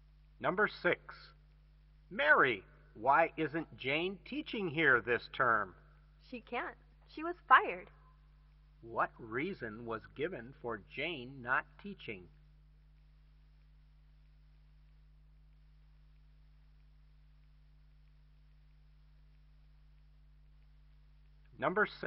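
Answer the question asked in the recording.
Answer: She was fired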